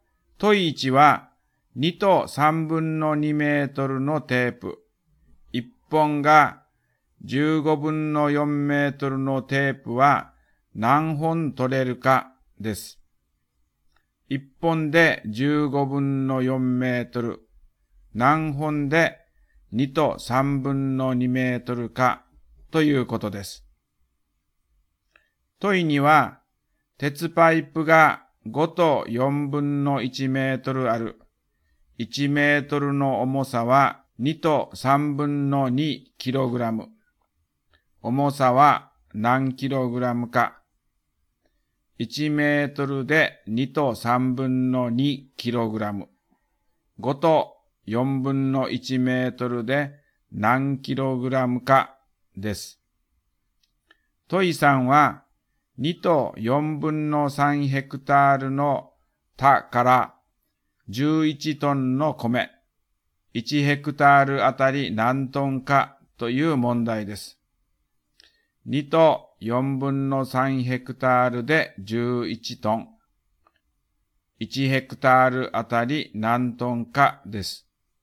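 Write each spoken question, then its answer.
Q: 問1は、2と3分の2メートルのテープ。1本が15分の4メートルのテープは何本取れるかです。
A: 10本

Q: 問2は、鉄パイプが5と4分の1メートルある。 1メートルの重さは2と3分の2キログラム。重さは何キログラムか。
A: 14キログラム

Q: 問3は、2と4分の3ヘクタールの田から11トンの米、1ヘクタールあたり何トンかという問題です。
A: 4トン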